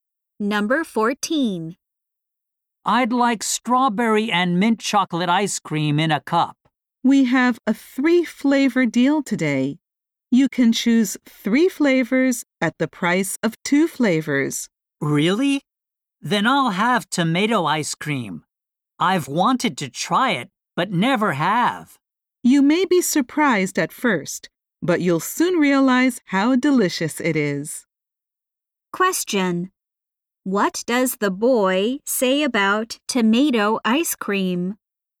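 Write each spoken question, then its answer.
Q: What does the boy say about tomato ice cream?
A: He has wanted to try it but never has.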